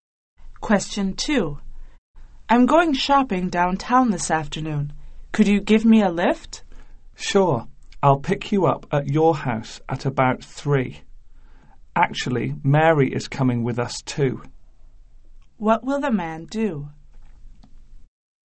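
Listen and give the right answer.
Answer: Drive the woman (and Mary) downtown, picking her up at about 3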